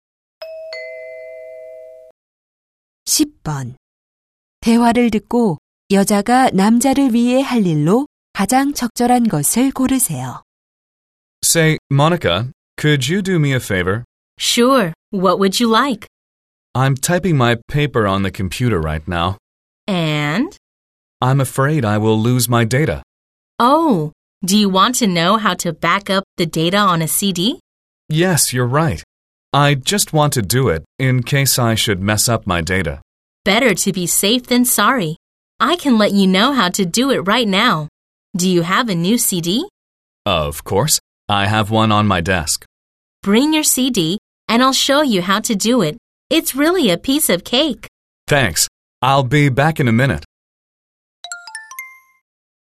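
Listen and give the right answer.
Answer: CD에 데이터 백업하는 방법 알려 주기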